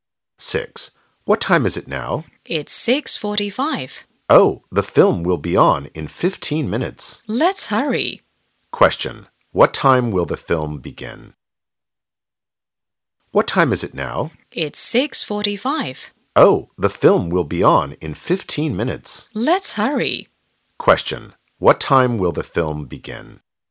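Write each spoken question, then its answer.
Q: What time will the film begin?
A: 7:00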